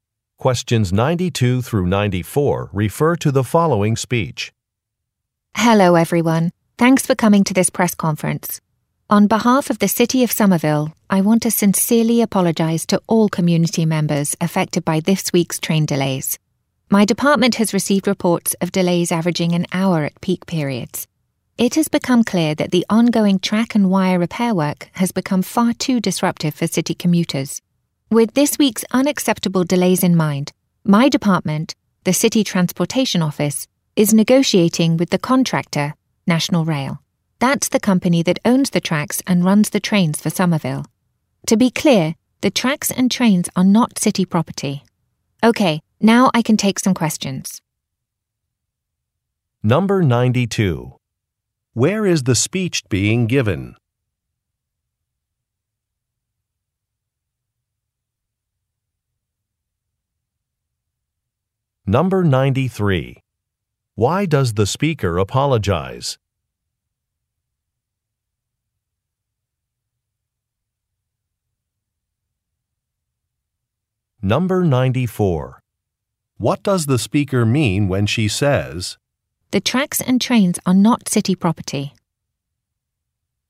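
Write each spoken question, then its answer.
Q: Where is the speech being given?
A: At a press conference

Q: Why does the speaker apologize?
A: Because of this week's train delays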